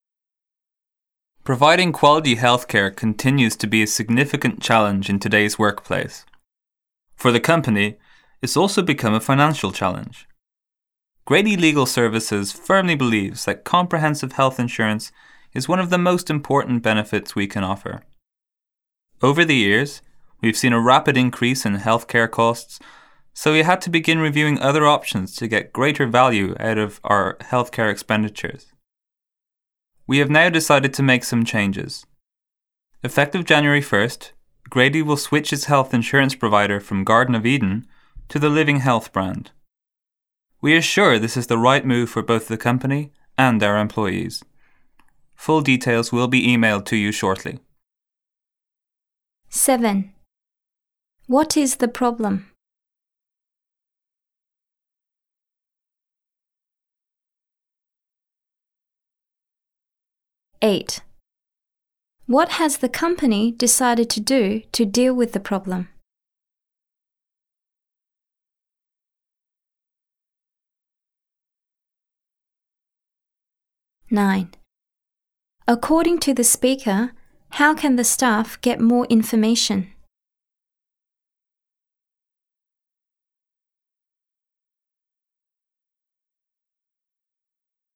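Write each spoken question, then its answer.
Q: What is the problem?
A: Healthcare costs have increased rapidly

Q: What has the company decided to do to deal with the problem?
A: Switch its health insurance provider to Living Health

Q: According to the speaker, how can the staff get more information?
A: Details will be emailed to them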